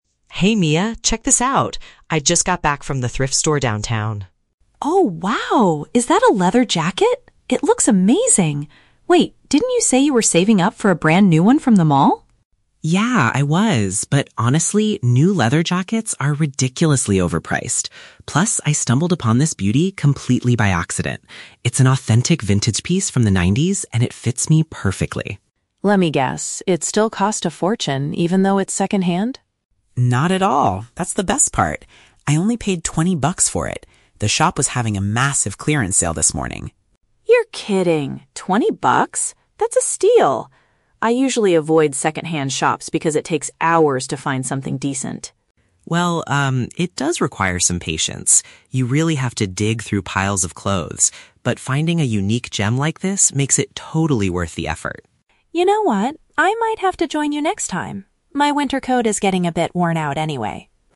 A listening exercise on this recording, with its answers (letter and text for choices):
Listen to the conversation between two college students. For each question, choose the correct answer (A, B, or C).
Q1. Why did Sam decide not to buy a jacket from the mall?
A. He couldn't find an authentic 90s style there.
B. He thinks the items there are far too expensive.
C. He wanted to wait for their massive clearance sale.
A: B. He thinks the items there are far too expensive.

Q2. What is Mia's main issue with second-hand shopping?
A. She dislikes spending a lot of time looking for good quality items.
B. She thinks used clothes are usually dirty and worn out.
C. She believes thrift stores still charge a fortune for vintage items.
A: A. She dislikes spending a lot of time looking for good quality items.

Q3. What does Mia plan to do in the future?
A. Buy a brand new winter coat from the mall.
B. Give her old winter coat to Sam.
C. Go shopping at the thrift store with Sam.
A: C. Go shopping at the thrift store with Sam.

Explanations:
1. Sam states that new leather jackets from the mall are "ridiculously overpriced," which is paraphrased as "far too expensive." Option A is a trap; while he found a 90s style at the thrift store, he never said the mall didn't have that style. Option C is a trap because the "clearance sale" happened at the thrift store, not the mall.
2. Mia says she avoids second-hand shops because "it takes hours to find something decent." This matches the idea of disliking spending time looking for good items. Option B is plausible in real life but is never mentioned in the audio. Option C is a trap because she asks if Sam's jacket cost a fortune, but it is not her stated reason for avoiding the stores.
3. At the end of the conversation, Mia says, "I might have to join you next time," indicating she wants to go thrift shopping with him. Option A is plausible, but she intends to replace her coat at the thrift store, not the mall. Option B is a trap; she mentions her winter coat is "worn out" (old), but she is not giving it to Sam.

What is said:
Sam: Hey Mia, check this out! I just got back from the thrift store downtown.
Mia: Oh wow, is that a leather jacket? It looks amazing! Wait, didn't you say you were saving up for a brand new one from the mall?
Sam: Yeah, I was. But honestly, new leather jackets are ridiculously overpriced. Plus, I stumbled upon this beauty completely by accident. It's an authentic vintage piece from the nineties, and it fits me perfectly.
Mia: Let me guess, it still cost a fortune even though it's second-hand?
Sam: Not at all! That's the best part. I only paid twenty bucks for it. The shop was having a massive clearance sale this morning.
Mia: You're kidding! That's a steal. I usually avoid second-hand shops because it takes hours to find something decent.
Sam: Well, um, it does require some patience. You really have to dig through piles of clothes, but finding a unique gem like this makes it totally worth the effort.
Mia: You know what? I might have to join you next time. My winter coat is getting a bit worn out anyway.